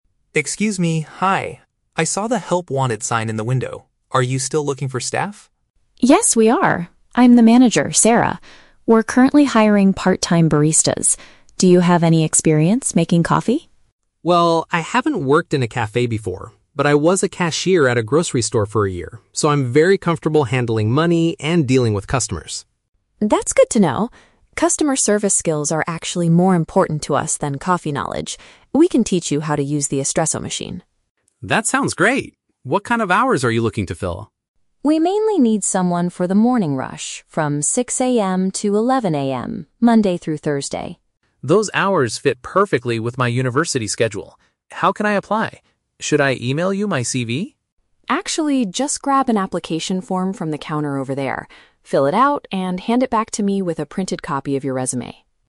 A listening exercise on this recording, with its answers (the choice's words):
Listen to the conversation between a job seeker and a cafe manager. Choose the correct answer (A, B, or C) for each question.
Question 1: What position is the cafe trying to fill?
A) A cashier for a local grocery store.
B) A part-time coffee maker.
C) A full-time customer service manager.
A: A part-time coffee maker.

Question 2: Why does the manager think Liam's lack of cafe experience is acceptable?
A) Because he already knows how to operate an espresso machine.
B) Because handling money is the most difficult part of the job.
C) Because being good with people is their main priority.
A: Because being good with people is their main priority.

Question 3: What is the correct way for the man to apply for the job?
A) By sending his resume to the manager's email address.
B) By calling the manager between 6 AM and 11 AM.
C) By completing a physical document at the shop.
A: By completing a physical document at the shop.

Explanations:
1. Sarah mentions they are hiring "part-time baristas". Option (B) correctly paraphrases "barista" as "coffee maker". Option (A) is The Trap: Liam was a cashier at a grocery store in the past, but that is not the position the cafe is filling. Option (C) uses words from the audio ("manager", "customer service") but creates a false role.
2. Sarah states that "Customer service skills are actually more important to us than coffee knowledge". Option (C) perfectly paraphrases this idea (good with people = customer service skills; main priority = more important). Option (A) is The Trap: An espresso machine is mentioned, but Sarah says "We can teach you how to use the espresso machine", meaning he doesn't know it yet. Option (B) is not mentioned.
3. Sarah tells him to "grab an application form from the counter over there, fill it out, and hand it back". Option (C) summarizes this as completing a physical document at the shop. Option (A) is The Trap: Liam asks "Should I email you my CV?", but Sarah responds with "Actually, just...", which means she rejects the email idea. Option (B) is The Trap: 6 AM to 11 AM are the work shift hours, not the time to call.

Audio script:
Liam: Excuse me, hi. I saw the "Help Wanted" sign in the window. Are you still looking for staff?
Sarah: Yes, we are. I'm the manager, Sarah. We're currently hiring part-time baristas. Do you have any experience making coffee?
Liam: Well, I haven't worked in a cafe before, but I was a cashier at a grocery store for a year, so I'm very comfortable handling money and dealing with customers.
Sarah: That's good to know. Customer service skills are actually more important to us than coffee knowledge. We can teach you how to use the espresso machine.
Liam: That sounds great! What kind of hours are you looking to fill?
Sarah: We mainly need someone for the morning rush, from 6 AM to 11 AM, Monday through Thursday.
Liam: Those hours fit perfectly with my university schedule. How can I apply? Should I email you my CV?
Sarah: Actually, just grab an application form from the counter over there, fill it out, and hand it back to me with a printed copy of your resume.